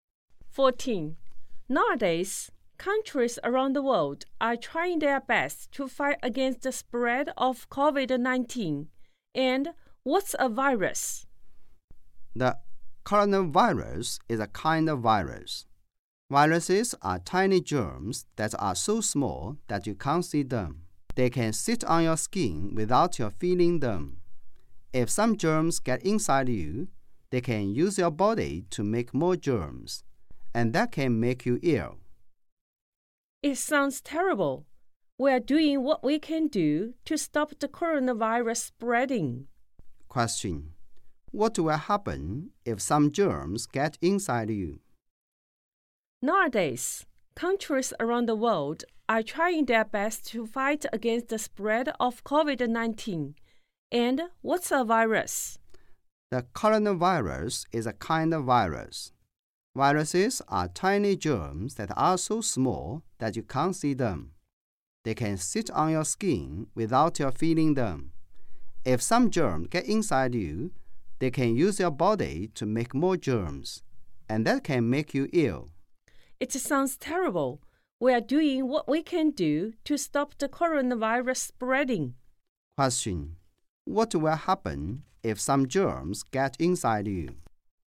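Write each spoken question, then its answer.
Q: What will happen if some germs get inside you?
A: They use your body to make more germs and can make you ill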